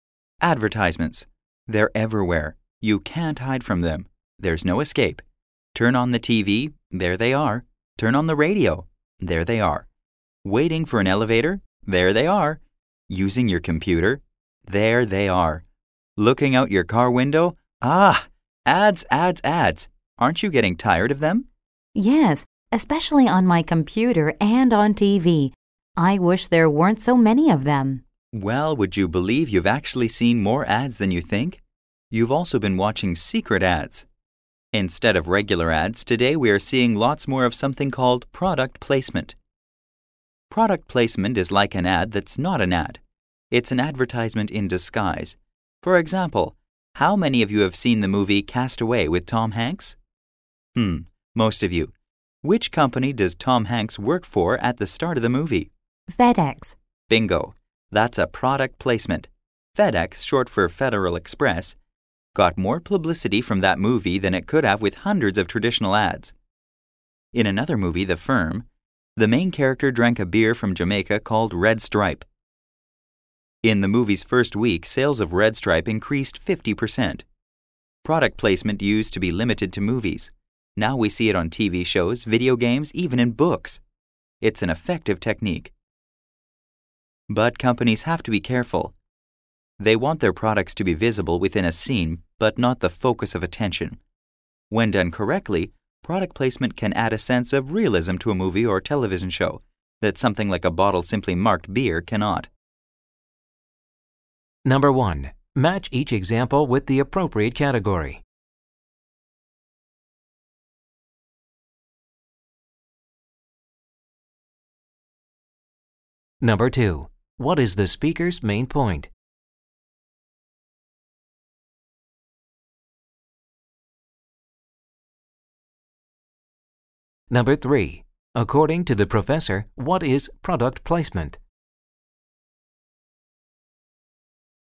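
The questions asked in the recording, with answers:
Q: According to the professor, what is product placement?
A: An advertisement in disguise, a product shown within a movie or show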